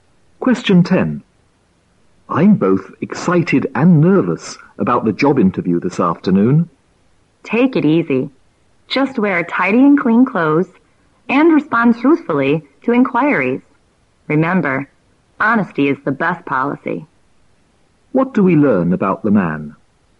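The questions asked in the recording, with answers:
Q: What do we learn about the man?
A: He is excited and nervous about a job interview this afternoon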